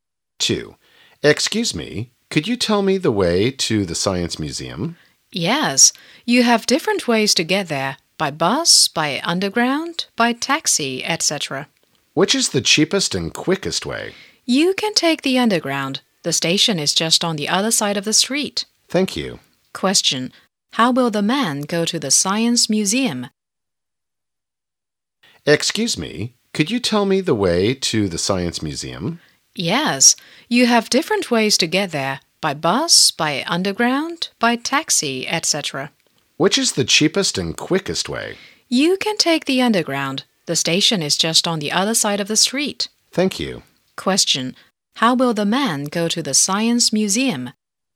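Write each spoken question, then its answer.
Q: How will the man go to the Science Museum?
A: By underground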